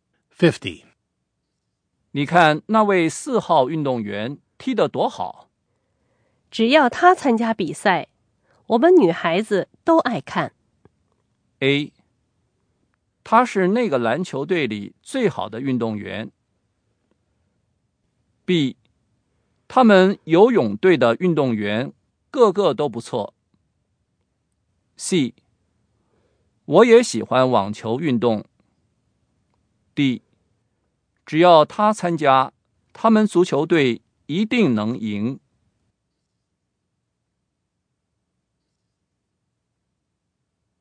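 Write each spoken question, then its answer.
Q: 只要他参加比赛,我们女孩子都爱看。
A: D: 只要他参加,他们足球队一定能赢。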